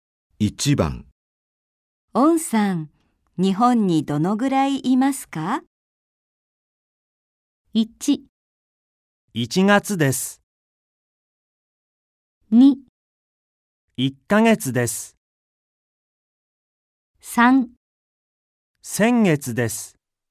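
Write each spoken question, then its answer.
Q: オンさん、日本にどのぐらいいますか?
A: 2: 1ヶ月です。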